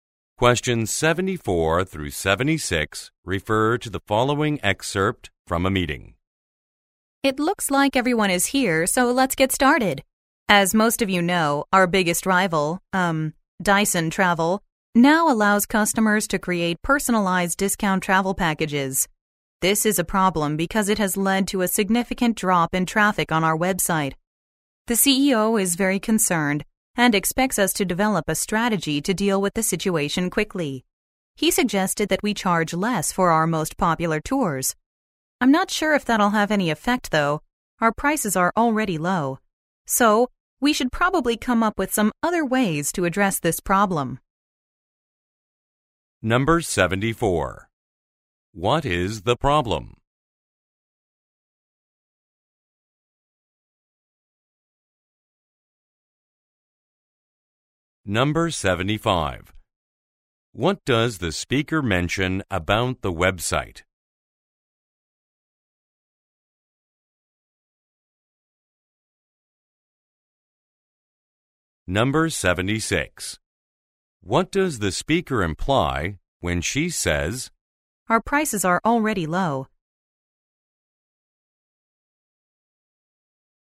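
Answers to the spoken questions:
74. A competitor's personalized discount travel packages have drawn customers away
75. Its traffic has dropped significantly
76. Lowering the tour prices may not work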